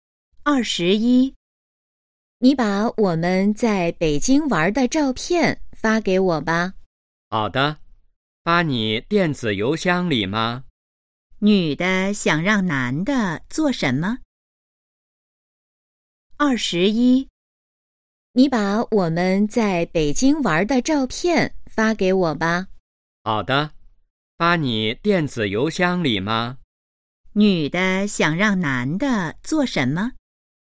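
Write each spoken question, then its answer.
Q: 女的想让男的做什么?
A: 发照片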